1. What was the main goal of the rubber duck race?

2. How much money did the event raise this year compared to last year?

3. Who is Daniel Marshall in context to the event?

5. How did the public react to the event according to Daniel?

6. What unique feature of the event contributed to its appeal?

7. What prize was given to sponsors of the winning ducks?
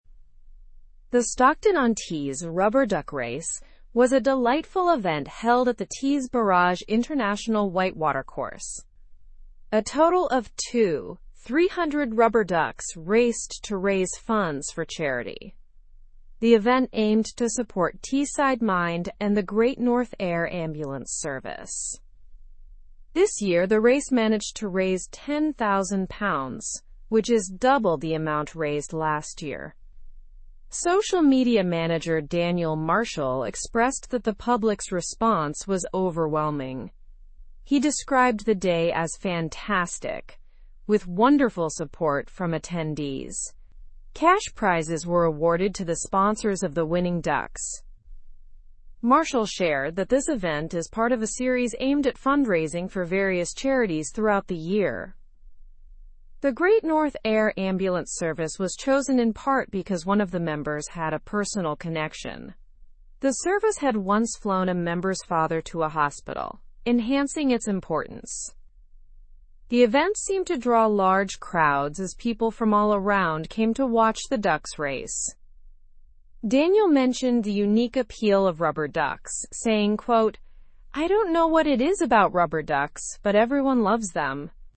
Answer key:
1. To raise funds for charity.
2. It raised £10,000, which is double the amount of last year.
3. He is the social media manager.
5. The public's response was described as overwhelming.
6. The unique appeal of rubber ducks contributed to its appeal.
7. Cash prizes were awarded to them.

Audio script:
The Stockton-on-Tees rubber duck race was a delightful event held at the Tees Barrage International White Water Course. A total of 2,300 rubber ducks raced to raise funds for charity. The event aimed to support Teesside Mind and the Great North Air Ambulance Service.
This year, the race managed to raise £10,000, which is double the amount raised last year. Social media manager Daniel Marshall expressed that the public's response was overwhelming. He described the day as fantastic, with wonderful support from attendees. Cash prizes were awarded to the sponsors of the winning ducks.
Marshall shared that this event is part of a series aimed at fundraising for various charities throughout the year. The Great North Air Ambulance Service was chosen in part because one of the members had a personal connection. The service had once flown a member's father to a hospital, enhancing its importance.
The event seemed to draw large crowds as people from all around came to watch the ducks race. Daniel mentioned the unique appeal of rubber ducks, saying, "I don't know what it is about rubber ducks, but everyone loves them."

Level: Level 3